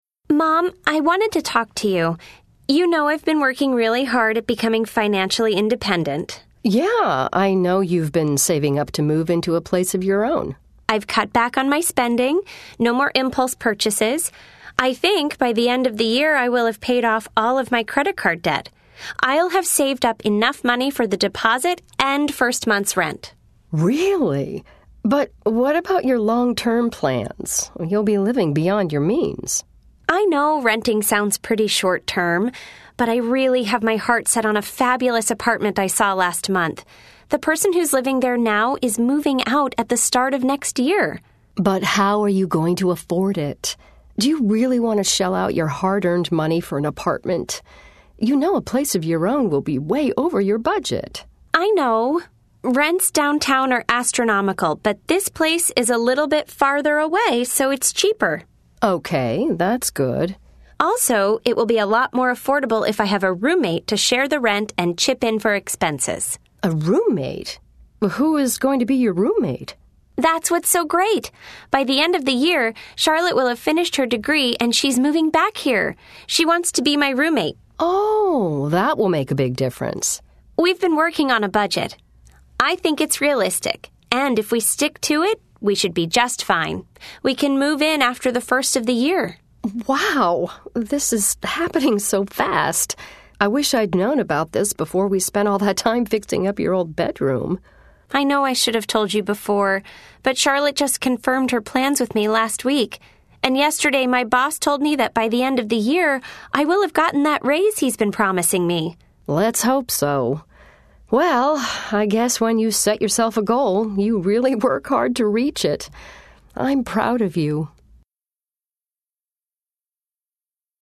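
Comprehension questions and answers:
Listen to the conversation. Then select all the correct answers.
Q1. What will make it possible for Emma to move into an apartment?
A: She will have paid off her credit card debt, saved enough for the deposit and first month's rent, and will share the rent with a roommate.

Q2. Why has Emma decided against an apartment downtown?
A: Rents downtown are astronomical; the place farther away is cheaper.

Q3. What are some things that will happen by the end of the year?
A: Emma will have paid off her credit card debt and saved the deposit, Charlotte will have finished her degree, and Emma will have gotten a raise.

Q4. Why did Emma wait until now to tell her mother about her plans?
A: Charlotte only confirmed her plans last week.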